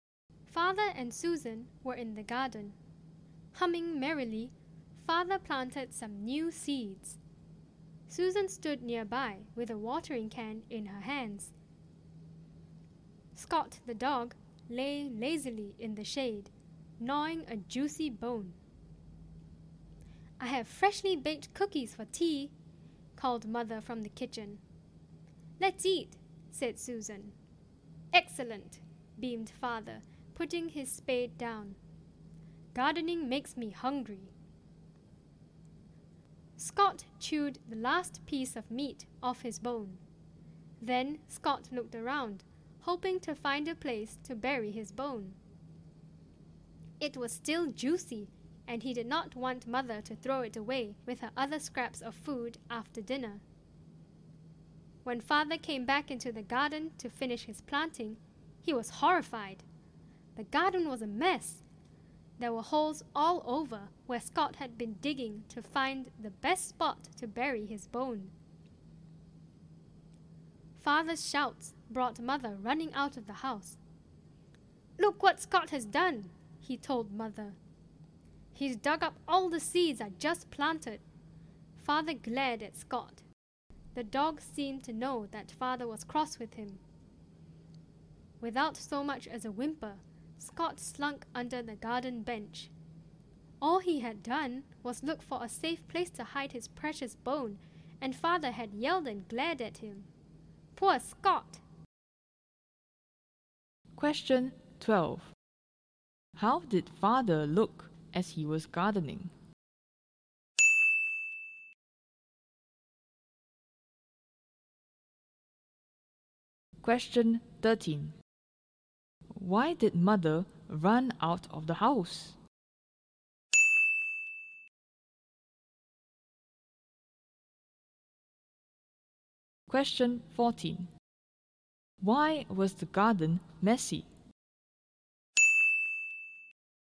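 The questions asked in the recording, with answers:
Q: How did Father look as he was gardening?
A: Happy; he was humming merrily

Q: Why did Mother run out of the house?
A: Because she heard Father shouting

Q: Why was the garden messy?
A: Scott the dog had dug holes everywhere looking for a place to bury his bone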